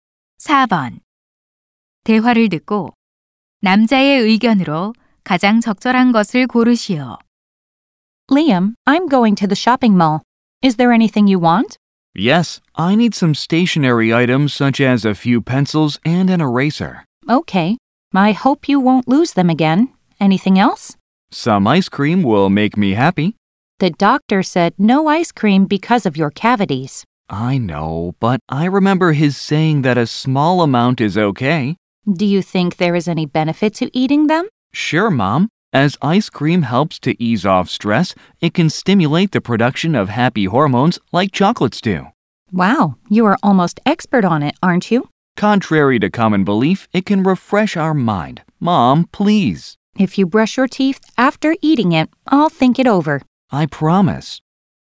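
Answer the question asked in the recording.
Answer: 아이스크림은 스트레스 해소에 도움이 된다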